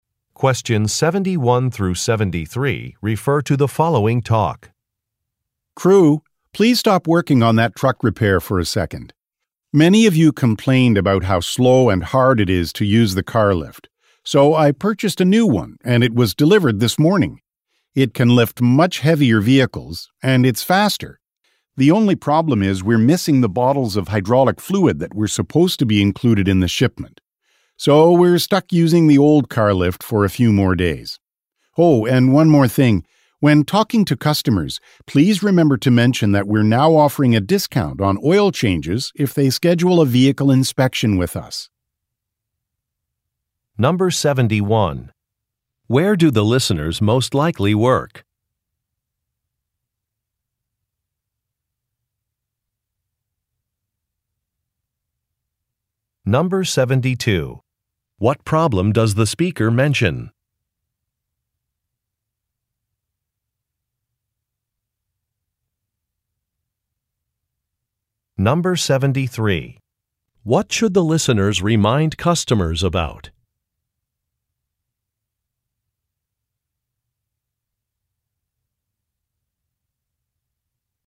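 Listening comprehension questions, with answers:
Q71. Where do the listeners most likely work?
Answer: At a vehicle repair shop

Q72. What problem does the speaker mention?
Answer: The hydraulic fluid was missing from the shipment

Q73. What should the listeners remind customers about?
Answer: A discount on oil changes if they schedule a vehicle inspection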